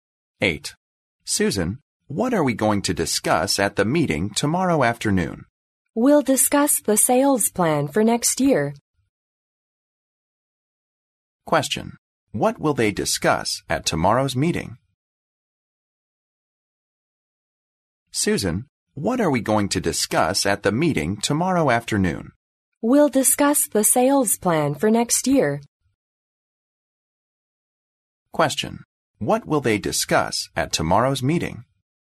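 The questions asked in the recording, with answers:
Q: What will they discuss at tomorrow's meeting?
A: The sales plan for next year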